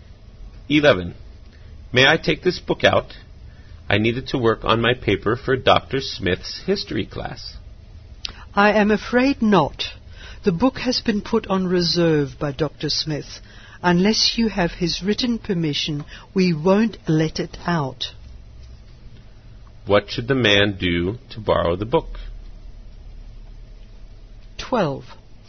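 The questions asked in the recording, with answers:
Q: What should the man do to borrow the book?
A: Get Dr. Smith's written permission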